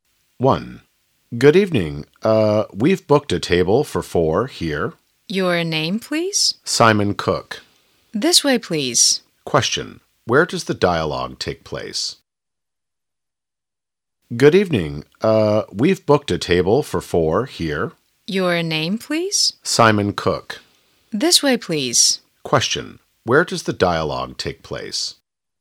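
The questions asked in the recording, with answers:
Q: Question. Where does the dialogue take place?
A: In a restaurant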